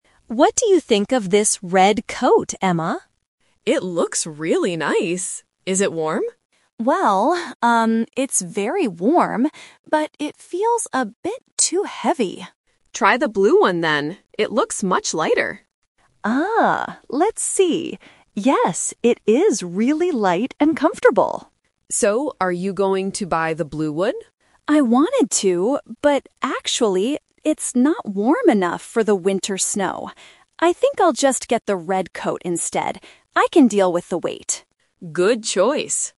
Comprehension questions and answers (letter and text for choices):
Listen to the conversation and choose the correct answer (A, B, or C).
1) What is the problem with the red coat?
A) It is too heavy.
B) It is not warm enough.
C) It is too expensive.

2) Why does Anna like the blue coat at first?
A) It is very warm.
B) It is light and comfortable.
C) It is her favorite color.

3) Which coat does Anna decide to buy?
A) The blue coat, because it is light.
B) The red coat, because it is warm.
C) She doesn't buy any coats.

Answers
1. A) It is too heavy.
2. B) It is light and comfortable.
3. B) The red coat, because it is warm.

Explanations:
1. Anna clearly states that the red coat "feels a bit too heavy." Option B is a trap (the blue coat is not warm enough, but the red one is very warm). Option C is a plausible guess for a shopping conversation, but price is never mentioned.
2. When Anna puts on the blue coat, she says, "it is really light and comfortable." Option A is a trap because the blue coat is actually not warm enough. Option C is plausible but is not mentioned in the audio.
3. This question uses the "Twist" technique. Anna originally wants the blue coat, but she changes her mind because winter snow requires a warmer coat. She decides to buy the red coat despite its weight. Option A is the main trap (what she almost did). Option C is incorrect.

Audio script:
Anna: What do you think of this red coat, Emma?
Emma: It looks really nice! Is it warm?
Anna: Well, um, it's very warm, but it feels a bit too heavy.
Emma: Try the blue one then. It looks much lighter.
Anna: Ah, let's see. Yes, it is really light and comfortable.
Emma: So, are you going to buy the blue one?
Anna: I wanted to, but actually... it's not warm enough for the winter snow. I think I'll just get the red coat instead. I can deal with the weight.